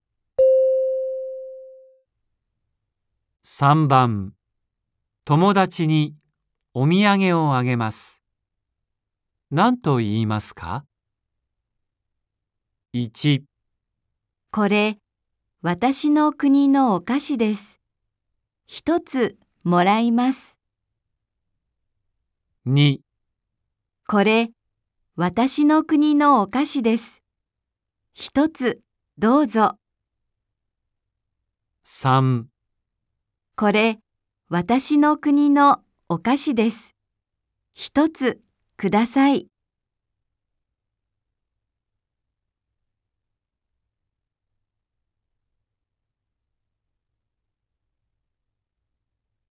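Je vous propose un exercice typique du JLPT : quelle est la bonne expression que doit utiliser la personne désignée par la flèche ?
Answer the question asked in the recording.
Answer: これ、私の国のお菓子です。一つどうぞ。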